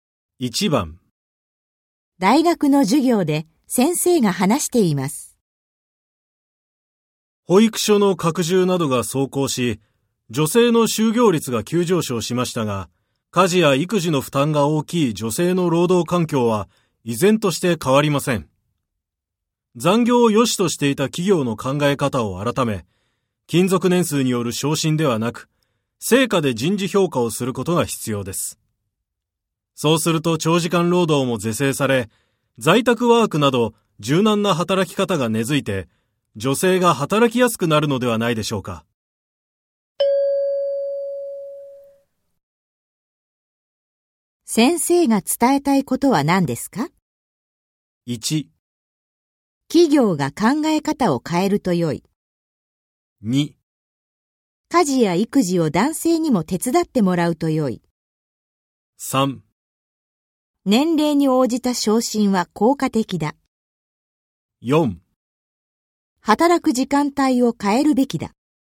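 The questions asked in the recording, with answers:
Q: 先生が伝えたいことは何ですか?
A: 1: 企業が考え方を変えると良い。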